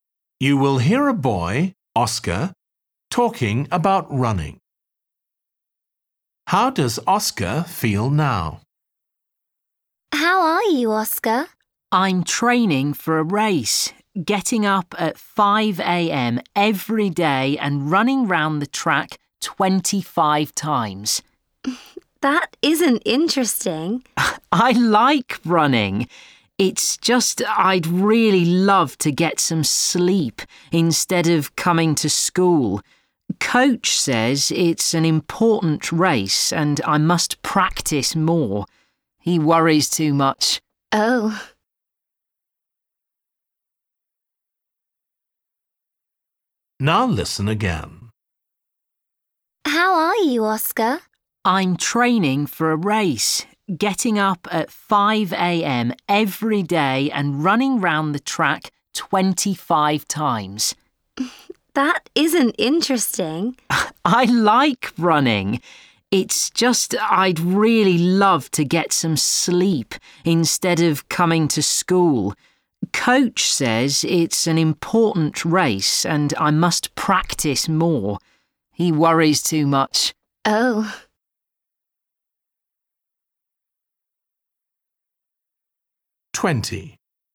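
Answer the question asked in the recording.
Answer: Tired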